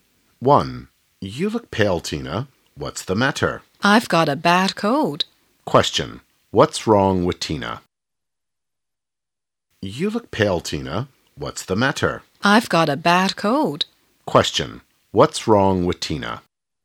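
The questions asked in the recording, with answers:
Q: What's wrong with Tina?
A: She has got a bad cold.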